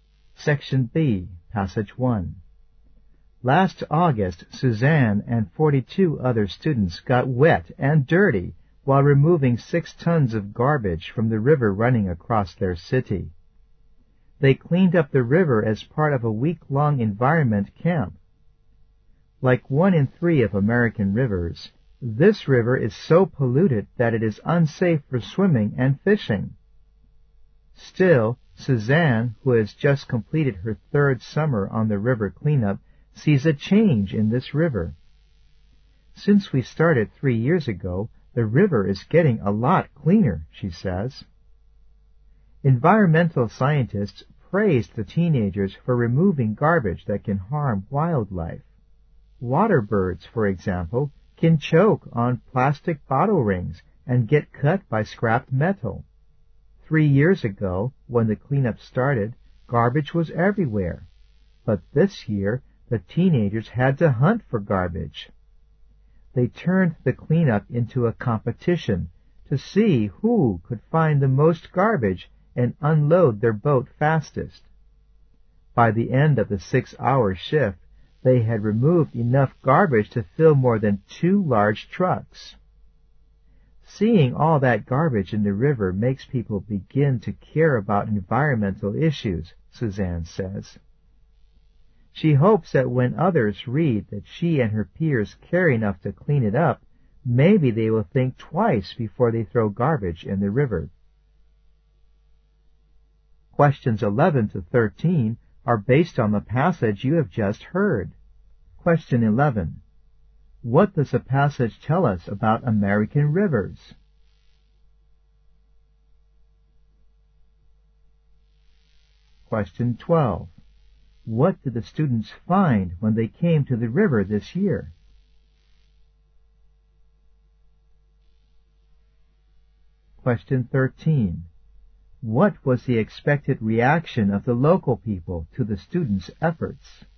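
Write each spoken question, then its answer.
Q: What does the passage tell us about American rivers?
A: One in three is too polluted to swim or fish in safely.

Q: What did the students find when they came to the river this year?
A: There was much less garbage; they had to hunt for it.

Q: What was the expected reaction of the local people to the students' efforts?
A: They would think twice before throwing garbage into the river.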